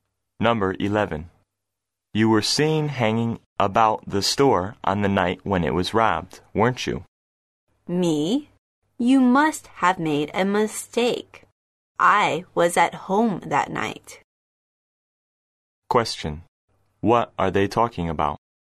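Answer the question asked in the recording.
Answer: A store robbery; the man denies being near the store that night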